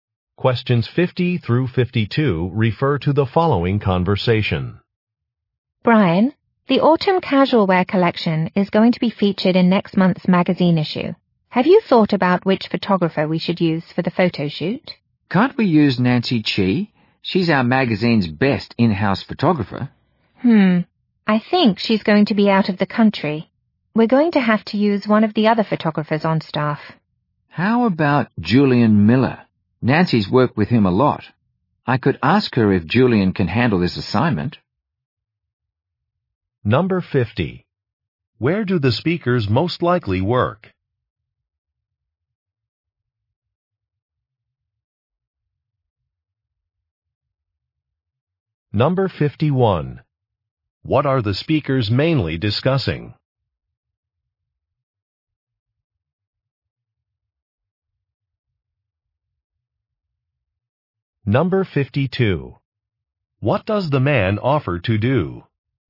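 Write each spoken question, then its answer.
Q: Where do the speakers most likely work?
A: At a magazine

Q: What are the speakers mainly discussing?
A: Choosing a photographer for a photo shoot

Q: What does the man offer to do?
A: Ask Nancy if Julian can handle the assignment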